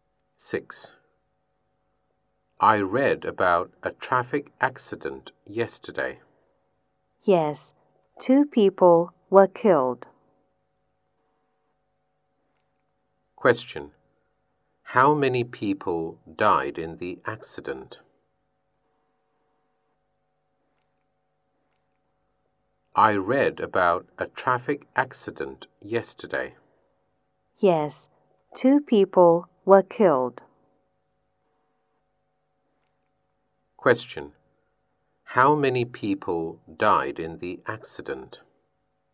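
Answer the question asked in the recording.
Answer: Two people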